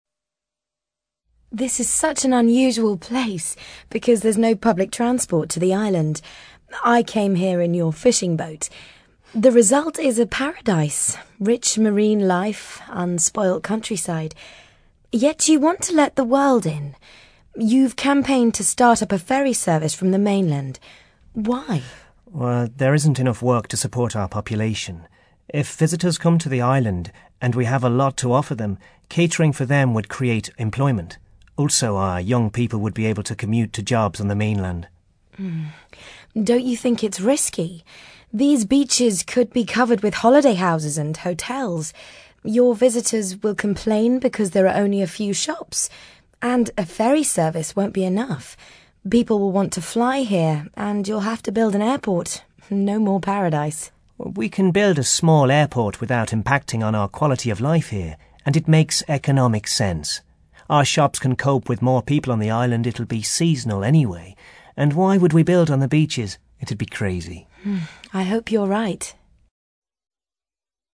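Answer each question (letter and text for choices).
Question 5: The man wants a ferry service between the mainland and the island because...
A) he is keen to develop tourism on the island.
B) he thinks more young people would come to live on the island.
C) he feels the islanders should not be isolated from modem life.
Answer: A) he is keen to develop tourism on the island.

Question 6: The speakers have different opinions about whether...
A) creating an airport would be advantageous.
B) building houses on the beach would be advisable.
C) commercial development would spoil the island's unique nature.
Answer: A) creating an airport would be advantageous.

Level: CAE Certificate in Advanced English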